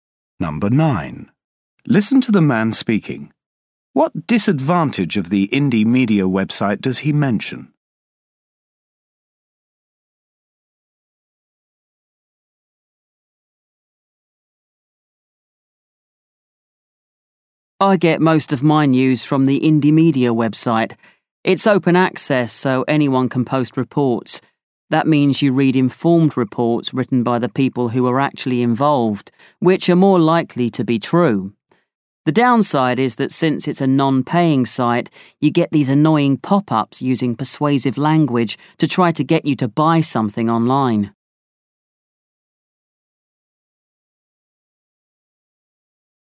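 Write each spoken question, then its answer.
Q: What disadvantage of the indie media website does he mention?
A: Annoying pop-up adverts trying to get you to buy things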